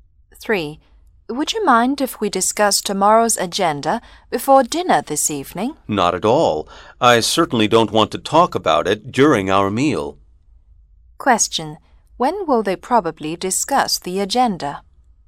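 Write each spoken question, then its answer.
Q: When will they probably discuss the agenda?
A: This evening before dinner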